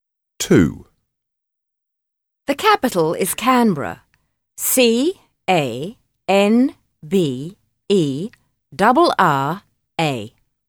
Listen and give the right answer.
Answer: Canberra